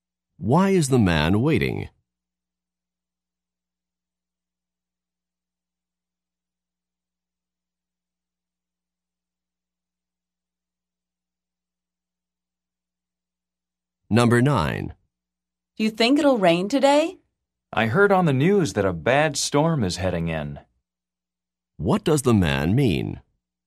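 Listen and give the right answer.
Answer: It will probably rain because a bad storm is coming.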